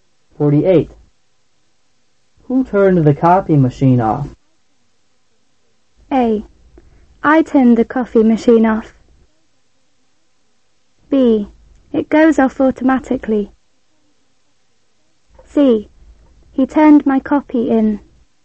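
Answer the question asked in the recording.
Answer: B: It goes off automatically.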